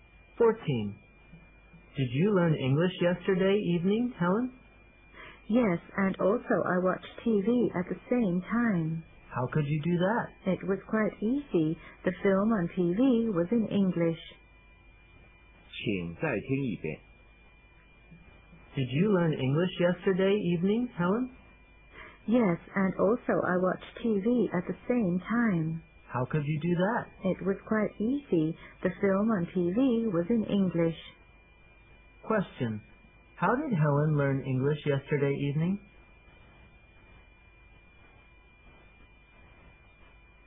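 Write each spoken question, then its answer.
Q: Question. How did Helen learn English yesterday evening?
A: By watching an English film on TV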